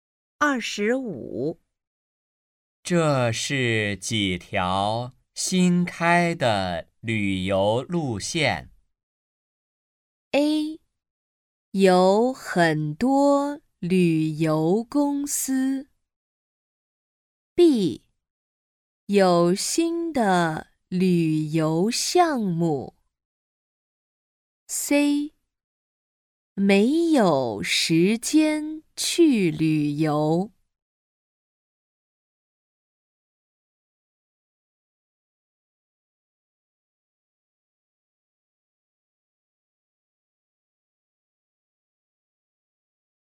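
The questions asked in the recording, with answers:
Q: 这是几条新开的旅游路线?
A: B: 有新的旅游项目。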